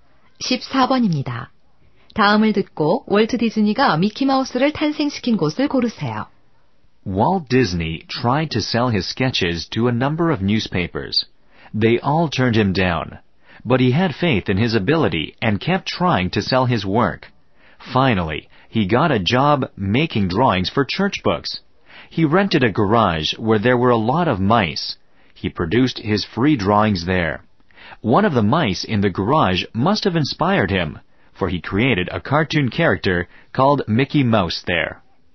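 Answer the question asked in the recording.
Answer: 쥐가 많은 차고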